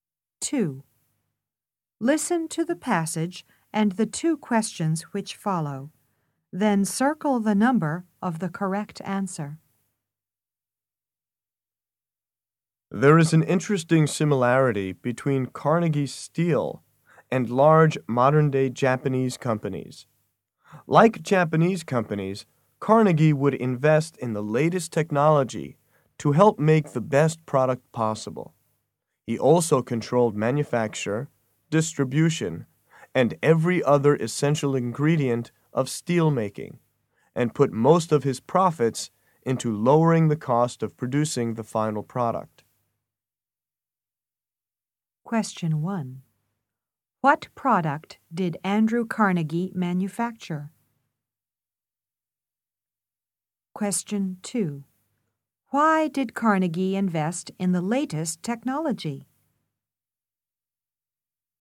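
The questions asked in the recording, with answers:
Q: What product did Andrew Carnegie manufacture?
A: Steel

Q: Why did Carnegie invest in the latest technology?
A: To help make the best product possible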